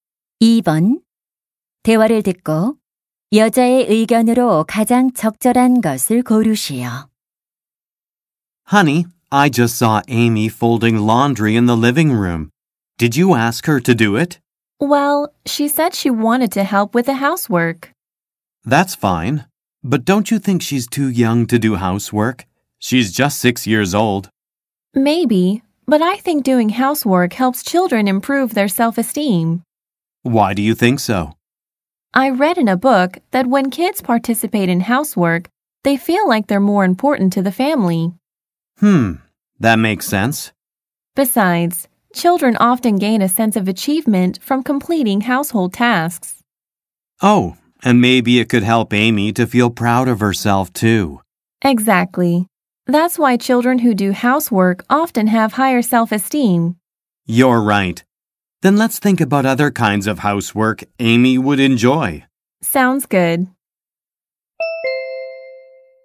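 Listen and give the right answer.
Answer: 집안일을 하는 것은 아이들의 자존감 향상에 도움이 된다.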